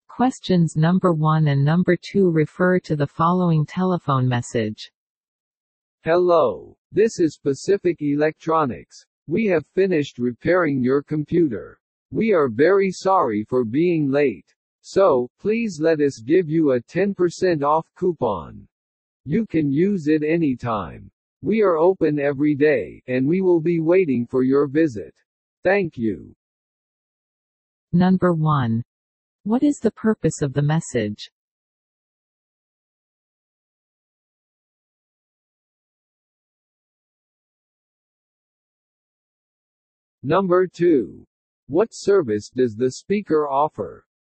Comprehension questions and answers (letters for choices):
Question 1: What is the purpose of the message?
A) To order a new computer.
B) To ask about a coupon.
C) To request repairs.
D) To tell about completed work.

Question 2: What service does the speaker offer ?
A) Repair.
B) Discount.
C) Return.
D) Exchange.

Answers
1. D
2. B

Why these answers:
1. メッセージの冒頭で"We have finished repairing your computer. "(コンピューターの修理が終わりました。)と用件を伝えています。
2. 2つ目のまとまりで話し手は"please let us give you a 10 percent off coupon."(10パーセントの割り引きクーポンを差し上げます。)と述べています。

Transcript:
Questions No.1 and No.2 refer to the following telephone message.
Hello. This is Pacific Electronics. We have finished repairing your computer. We are very sorry for being late. So, please let us give you a 10 percent off coupon. You can use it anytime. We are open every day, and we will be waiting for your visit. Thank you.